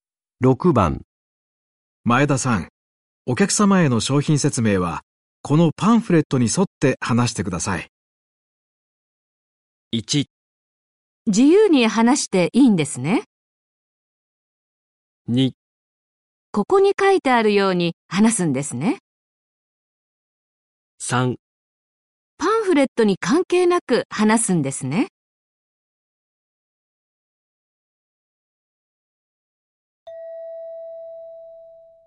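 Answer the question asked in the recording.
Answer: 2: ここに書いてあるように話すんですね。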